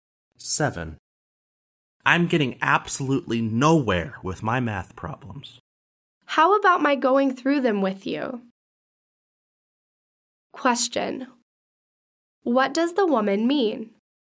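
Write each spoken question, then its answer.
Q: What does the woman mean?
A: She offers to help him with his math problems.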